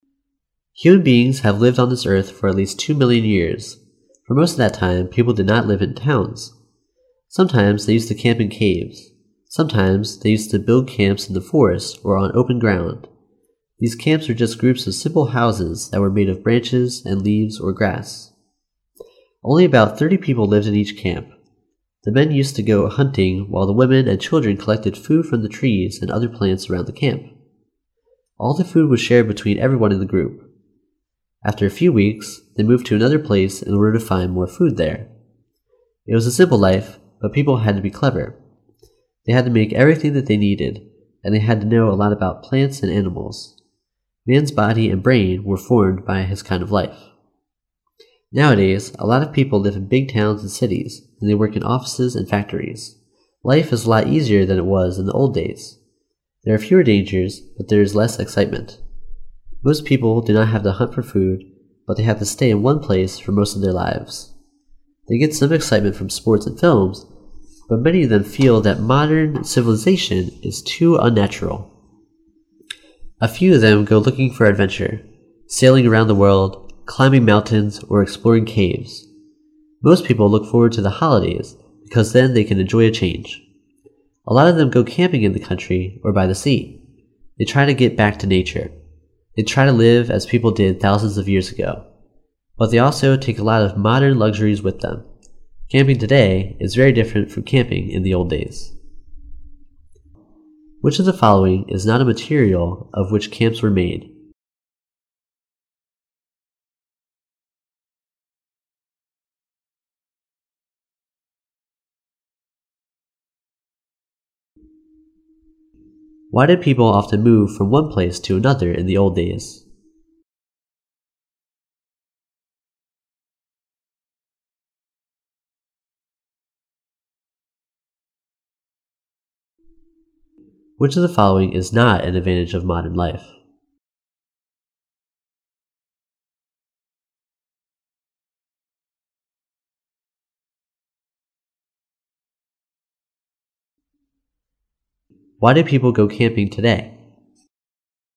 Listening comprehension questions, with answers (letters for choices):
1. Why did people often move from one place to another in the old days?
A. Because they wanted to find more food.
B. Because they wanted to build new camps.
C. Because they wanted to escape enemies.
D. Because they wanted to find new spices.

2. Which of the followings is NOT an advantage of modem life?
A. Life is a lot easier.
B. There are fewer dangers.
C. Most people do not have to hunt for food.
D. There is more excitement.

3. Why do people go camping today?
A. Because they try to find some excitement.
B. Because they try to have fun from hunting.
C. Because they try to get back to nature.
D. Because they try to look for adventure.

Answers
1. A
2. D
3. C

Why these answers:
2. 细节题。由Life is a lot easier than it was in the old days. 和There are fewer dangers, but there is less excitement. 以及Most people do not have to hunt for food...可知较之过去,现代生活更加轻松,危险更少,不需要狩猎,排除的D是对原文的反义叙述。

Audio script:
[听力原文] Human beings have lived on this earth for at least two million years. For most of that time people did not live in towns. Sometimes they used to camp in caves. Sometimes they used to build camps in the forest or on open ground. These camps were just groups of simple houses that were made of branches and leaves or grass. Only about thirty people lived in each camp. The men used to go hunting while the women and children collected food from the trees and other plants around the camp. All the food was shared between everyone in the group. After a few weeks they moved to another place in order to find more food there. It was a simple life, but people had to be clever. They had to make everything that they needed, and they had to know a lot about plants and animals. Man's body and brain were formed by his kind of life. Nowadays a lot of people live in big towns and cities, and they work in offices and factories. Life is a lot easier than it was in the old days. There are fewer dangers, but there is less excitement. Most people do not have to hunt for food, but they have to stay in one place for most of their lives. They get some excitement from sport and films, but many of them feel that modem civilization is too unnatural. A few of them go looking for adventure—sailing round the world, climbing mountains, or exploring caves. Most people look forward to the holidays, because then they can enjoy a change. A lot of them go camping in the country, or by the sea. They try to get back to nature. They try to live as people did thousands of years ago. But they also take a lot of modem luxuries with them. Camping today is very different from camping in the old days.
Which of the followings is not a material of which camps were made?